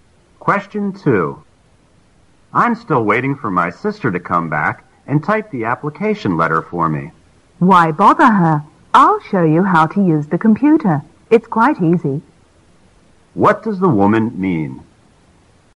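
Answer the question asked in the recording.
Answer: She will show the man how to type the letter on the computer himself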